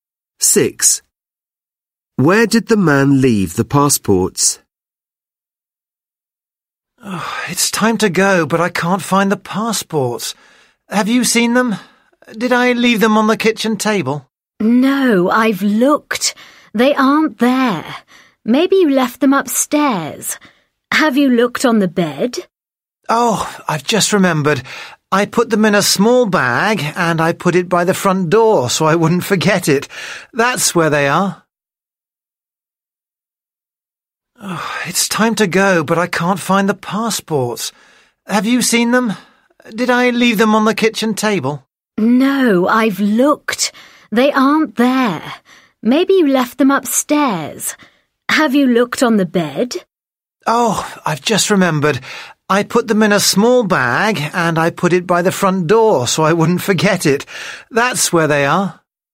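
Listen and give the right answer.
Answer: In a small bag by the front door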